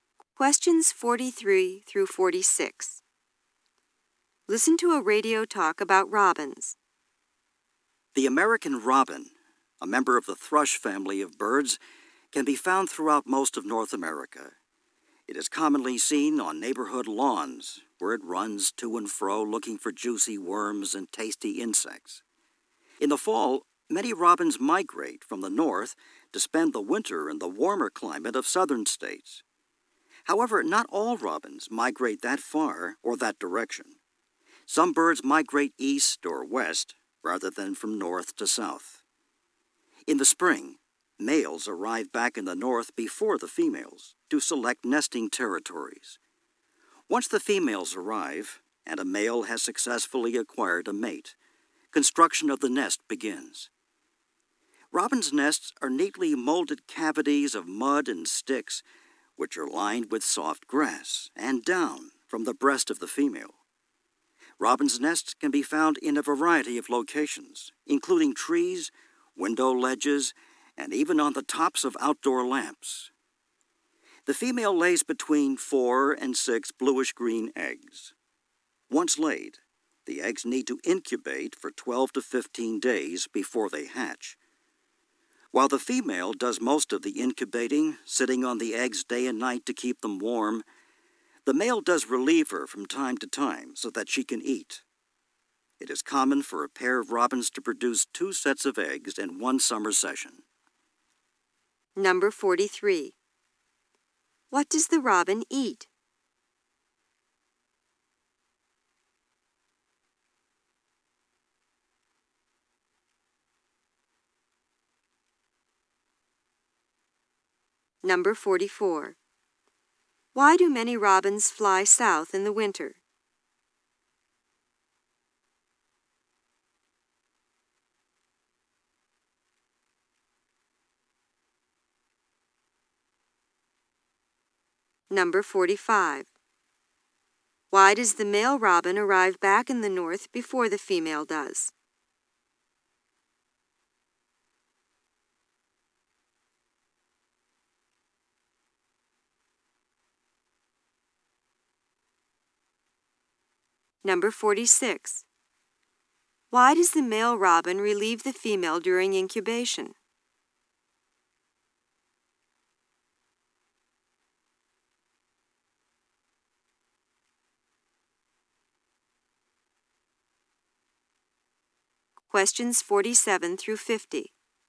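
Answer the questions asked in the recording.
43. Worms and insects.
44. For the warmer climate.
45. To select a nesting territory.
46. So that she can eat.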